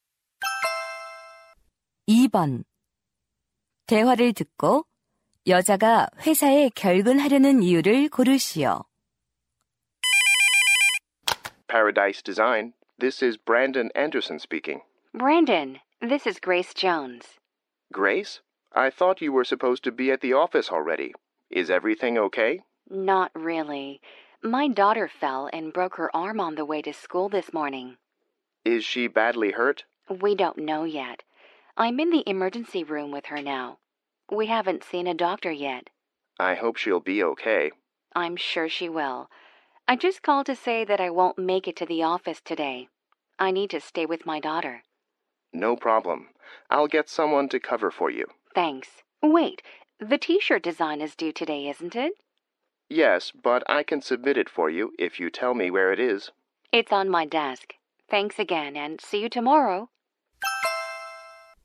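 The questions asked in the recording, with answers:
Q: 대화를 듣고 여자가 회사에 결근하려는 이유를 고르시오.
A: 딸이 팔이 부러져서 곁에 있어야 해서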